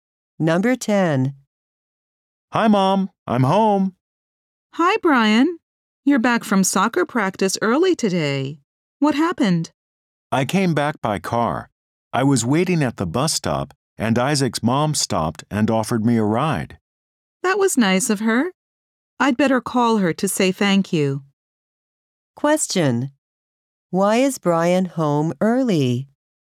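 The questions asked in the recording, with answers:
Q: Why is Brian home early?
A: Isaac's mom gave him a ride home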